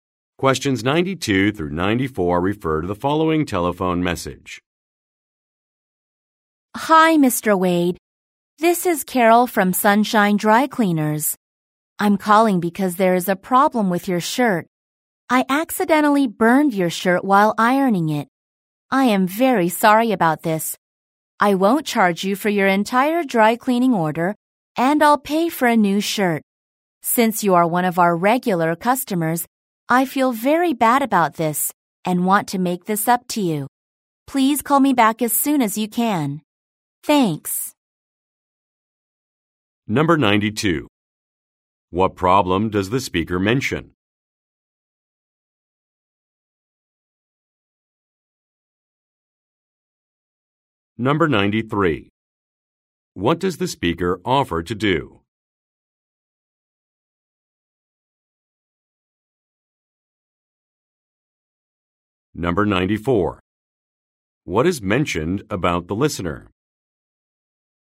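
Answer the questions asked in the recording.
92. She burned his shirt
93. Pay for a new shirt and not charge for the order
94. He is a regular customer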